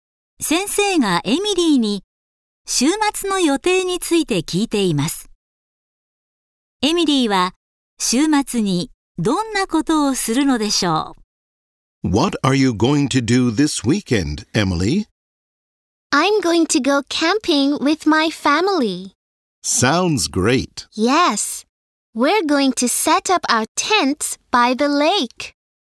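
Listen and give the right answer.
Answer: 家族とキャンプに行く(湖のそばでテントを張る)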